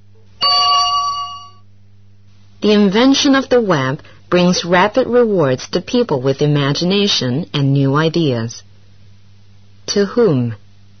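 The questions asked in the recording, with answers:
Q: To whom?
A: to people with imagination and new ideas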